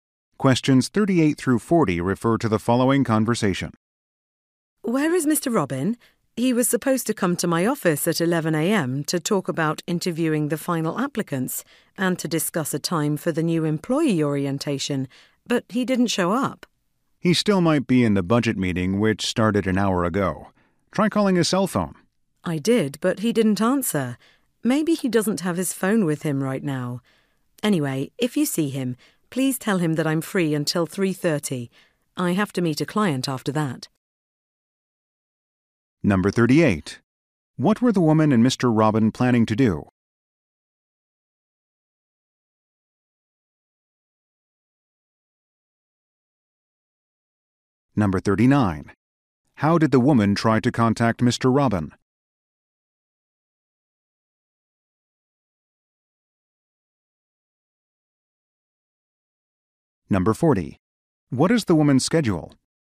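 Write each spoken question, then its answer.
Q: Robin planning to do?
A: Talk about interviewing final applicants and the new employee orientation

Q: How did the woman try to contact Mr.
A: By calling his cell phone

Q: What is the woman's schedule?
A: Free until 3:30, then meeting a client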